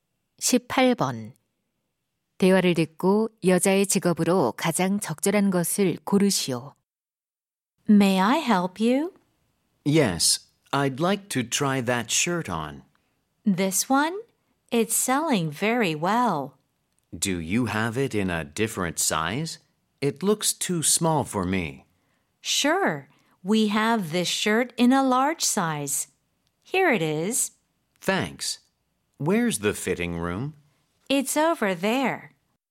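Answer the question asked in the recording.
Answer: 옷 가게 점원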